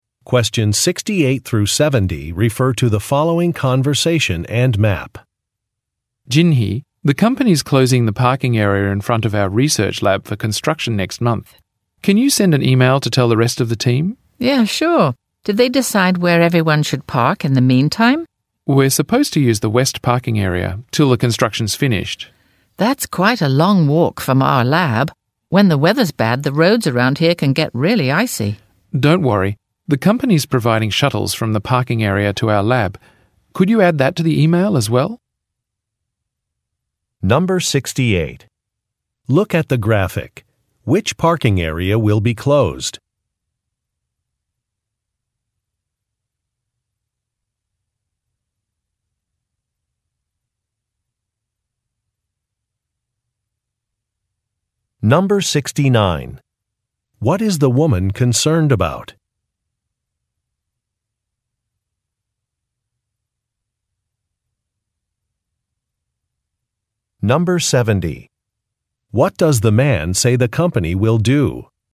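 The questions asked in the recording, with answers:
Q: What is the woman concerned about?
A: The long walk to the lab on icy roads in bad weather

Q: What does the man say the company will do?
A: Provide shuttles from the parking area to the lab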